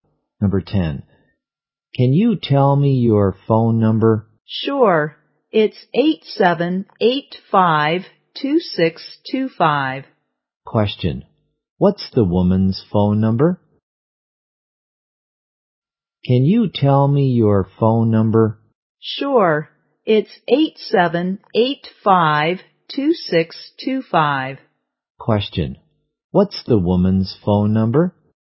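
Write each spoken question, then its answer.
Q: What's the woman's phone number?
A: 8785-2625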